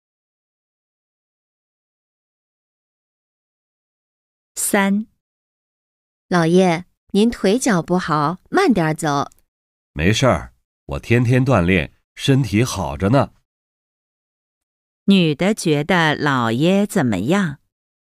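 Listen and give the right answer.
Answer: 腿脚不好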